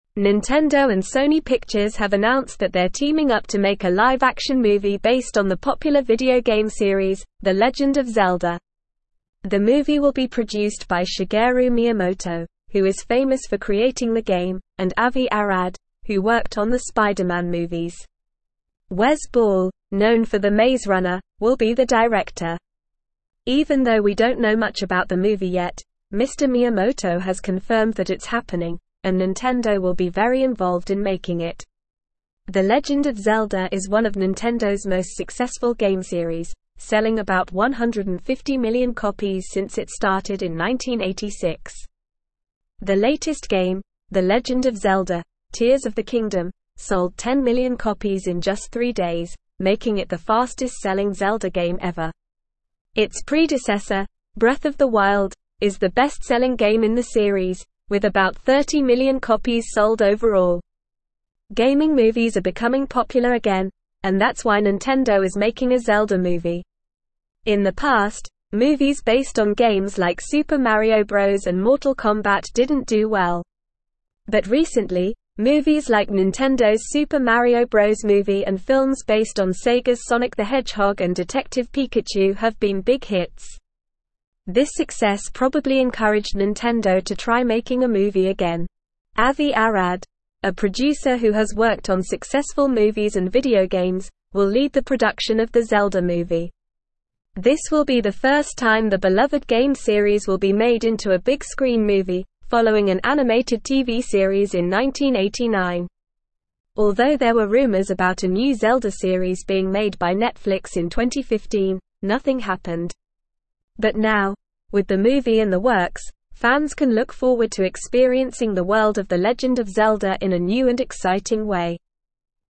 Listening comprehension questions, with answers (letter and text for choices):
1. Who is famous for creating The Legend of Zelda game?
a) Shigeru Miyamoto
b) Avi Arad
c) Wes Ball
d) Spider-Man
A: a) Shigeru Miyamoto

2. What is the latest game in The Legend of Zelda series?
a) Breath of the Wild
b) The Maze Runner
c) Tears of the Kingdom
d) Super Mario Bros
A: c) Tears of the Kingdom

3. Who will be the director of the upcoming Zelda movie?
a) Shigeru Miyamoto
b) Avi Arad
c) Spider-Man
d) Wes Ball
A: d) Wes Ball

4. What is the best-selling game in The Legend of Zelda series?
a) Tears of the Kingdom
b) Super Mario Bros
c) Breath of the Wild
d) The Maze Runner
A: c) Breath of the Wild

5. What encouraged Nintendo to make a Zelda movie?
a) The failure of past gaming movies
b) The success of recent gaming movies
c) The popularity of the Zelda game series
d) The success of The Legend of Zelda: Tears of the Kingdom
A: b) The success of recent gaming movies

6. Who will lead the production of the Zelda movie?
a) Avi Arad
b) Wes Ball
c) Shigeru Miyamoto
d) Spider-Man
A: a) Avi Arad

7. When was the last time The Legend of Zelda was made into a big-screen movie?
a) 1989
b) 2015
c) 1995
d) Never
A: d) Never

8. What was the result of the rumors about a new Zelda series being made by Netflix in 2015?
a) A new series was made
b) Nothing happened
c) A new movie was made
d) A new game was released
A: b) Nothing happened

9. The movie will be produced by Shigeru Miyamoto, who is (1)______ for (2)______ the game, and Avi Arad, who worked on the Spider-Man movies.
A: famous

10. The movie will be produced by Shigeru Miyamoto, who is (1)______ for (2)______ the game, and Avi Arad, who worked on the Spider-Man movies.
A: creating

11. Wes Ball, (3)______ for The Maze (4)______, will be the director.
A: known

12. Wes Ball, (3)______ for The Maze (4)______, will be the director.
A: Runner

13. Even though we don't know much about the movie yet, Mr. Miyamoto has confirmed that it's happening, and (5)______ will be very involved in making it.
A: Nintendo

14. The (6)______ of (7)______ is one of Nintendo's most successful game series, selling about 150 million copies since it (8)______ in 1986.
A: Legend

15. The (6)______ of (7)______ is one of Nintendo's most successful game series, selling about 150 million copies since it (8)______ in 1986.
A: Zelda

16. The (6)______ of (7)______ is one of Nintendo's most successful game series, selling about 150 million copies since it (8)______ in 1986.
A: started

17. In the past, movies (9)______ on games like Super Mario Bros and (10)______ Kombat didn't do well.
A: based

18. In the past, movies (9)______ on games like Super Mario Bros and (10)______ Kombat didn't do well.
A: Mortal

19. But recently, movies like Nintendo's Super Mario Bros Movie and films based on Sega's Sonic the (11)______ and Detective Pikachu have been big hits.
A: Hedgehog

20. Avi Arad, a (12)______ who has worked on successful (13)______ and video games, will lead the production of the Zelda movie.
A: producer

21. Avi Arad, a (12)______ who has worked on successful (13)______ and video games, will lead the production of the Zelda movie.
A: movies

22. This will be the first time the beloved game series will be made into a big-screen movie, (14)______ an animated TV series in 1989.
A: following

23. But now, with the movie in the works, fans can look forward to (15)______ the (16)______ of The Legend of Zelda in a new and exciting way.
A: experiencing

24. But now, with the movie in the works, fans can look forward to (15)______ the (16)______ of The Legend of Zelda in a new and exciting way.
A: world

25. The Legend of Zelda game series has not sold about 150 million copies since it started in 1986.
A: False

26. Nintendo and Sony Pictures are not teaming up to make a live-action movie based on The Legend of Zelda video game series.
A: False

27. Wes Ball, known for The Maze Runner, will not be the director of the Zelda movie.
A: False

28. The movie will be produced by Shigeru Miyamoto, the creator of the game, and Avi Arad, who worked on the Spider-Man movies.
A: True

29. Nintendo is not making a Zelda movie because recent gaming movies like Sonic the Hedgehog and Detective Pikachu have been big flops.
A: False

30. Breath of the Wild, a previous game in the series, is the best-selling game in the series, with about 30 million copies sold overall.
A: True

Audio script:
Nintendo and Sony Pictures have announced that they're teaming up to make a live-action movie based on the popular video game series, The Legend of Zelda. The movie will be produced by Shigeru Miyamoto, who is famous for creating the game, and Avi Arad, who worked on the Spider-Man movies. Wes Ball, known for The Maze Runner, will be the director. Even though we don't know much about the movie yet, Mr. Miyamoto has confirmed that it's happening, and Nintendo will be very involved in making it.
The Legend of Zelda is one of Nintendo's most successful game series, selling about 150 million copies since it started in 1986. The latest game, The Legend of Zelda: Tears of the Kingdom, sold 10 million copies in just three days, making it the fastest-selling Zelda game ever. Its predecessor, Breath of the Wild, is the best-selling game in the series, with about 30 million copies sold overall.
Gaming movies are becoming popular again, and that's why Nintendo is making a Zelda movie. In the past, movies based on games like Super Mario Bros and Mortal Kombat didn't do well. But recently, movies like Nintendo's Super Mario Bros Movie and films based on Sega's Sonic the Hedgehog and Detective Pikachu have been big hits. This success probably encouraged Nintendo to try making a movie again.
Avi Arad, a producer who has worked on successful movies and video games, will lead the production of the Zelda movie. This will be the first time the beloved game series will be made into a big-screen movie, following an animated TV series in 1989. Although there were rumors about a new Zelda series being made by Netflix in 2015, nothing happened. But now, with the movie in the works, fans can look forward to experiencing the world of The Legend of Zelda in a new and exciting way.

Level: Level 3